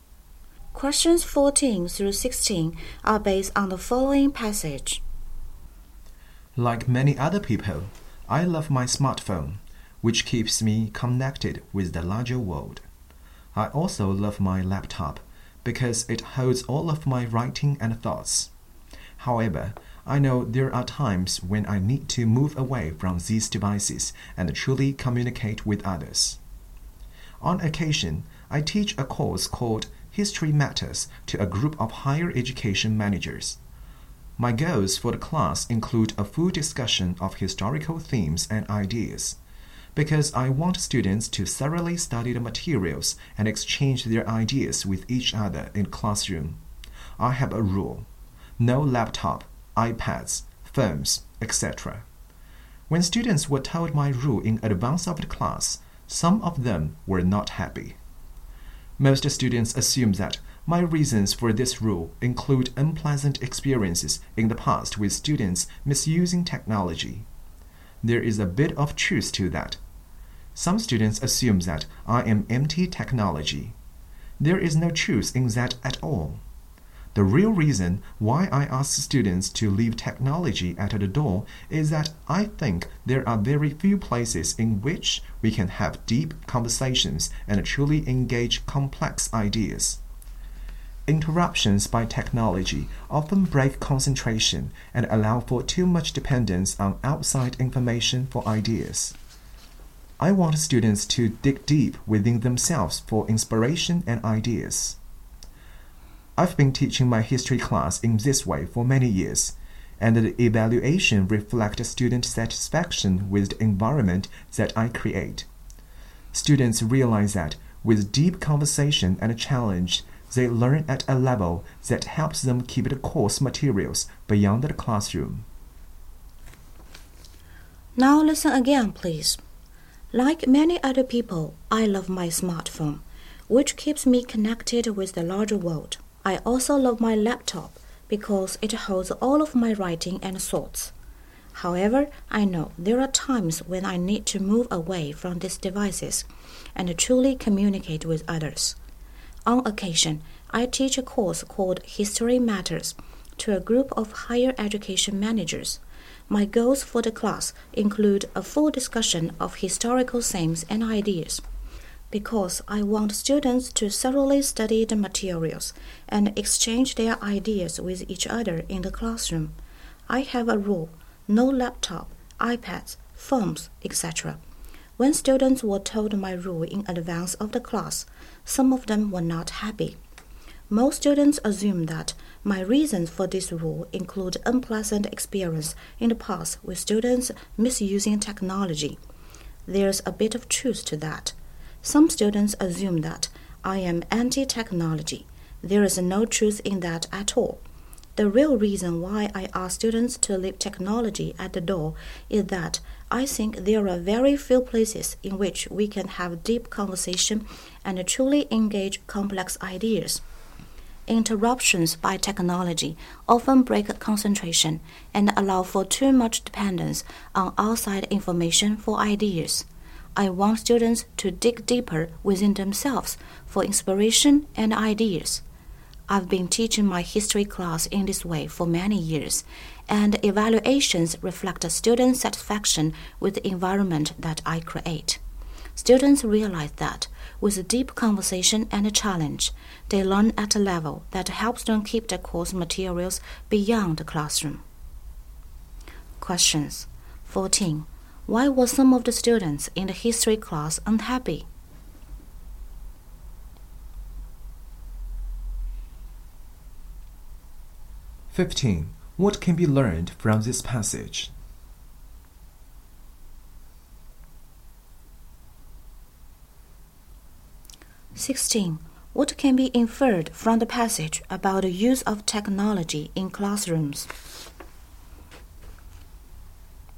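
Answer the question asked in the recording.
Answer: They couldn't use laptops, iPads or phones in class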